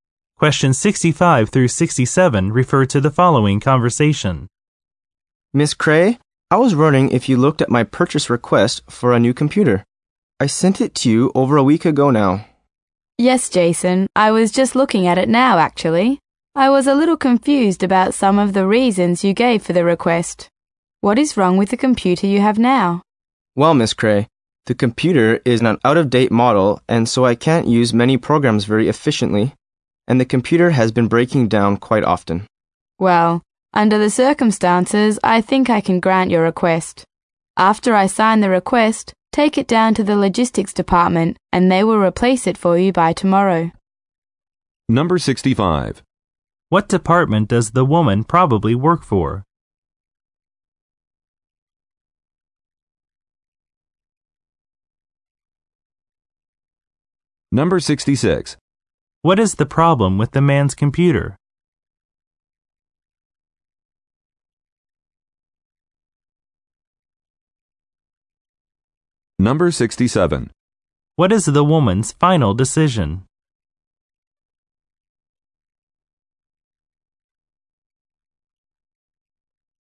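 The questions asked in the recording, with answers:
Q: What is the problem with the man's computer?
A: It is out of date and breaks down often

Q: What is the woman's final decision?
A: To grant his request for a new computer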